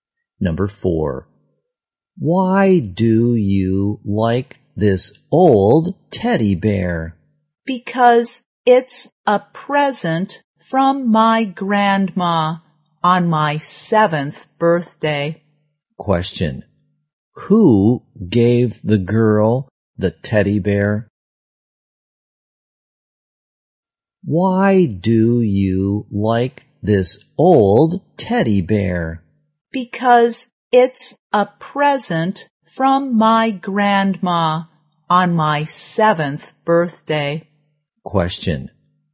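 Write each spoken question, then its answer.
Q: who gave the girl the teddy bear?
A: Her grandma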